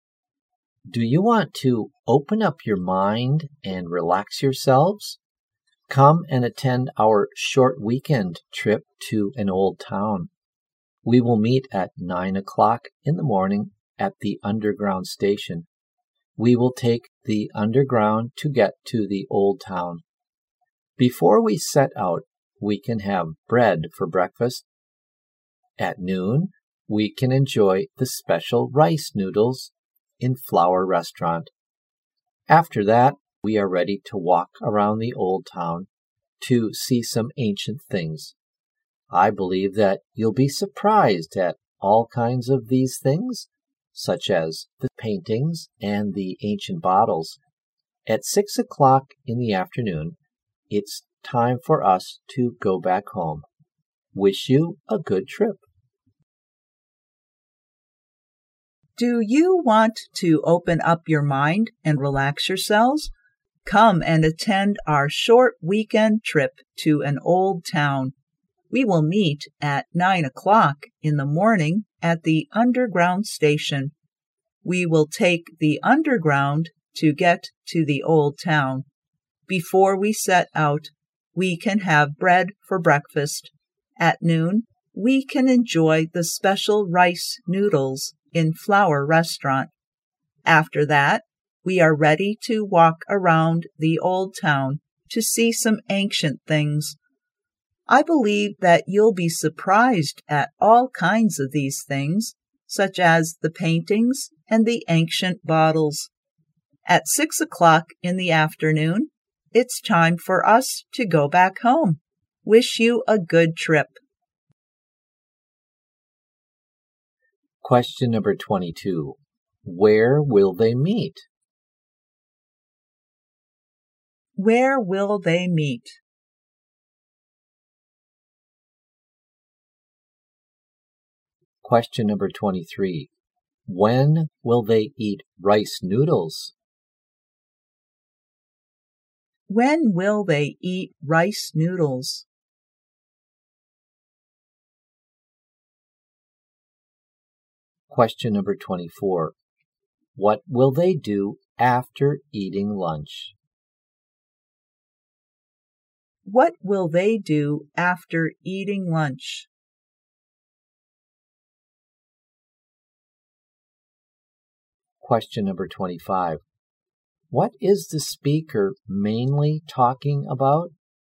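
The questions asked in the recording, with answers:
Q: Where will they meet?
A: At the underground station.

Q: When will they eat rice noodles?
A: At noon.

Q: What will they do after eating lunch?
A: Walk around the old town to see ancient things.

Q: What is the speaker mainly talking about?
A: A weekend trip to an old town.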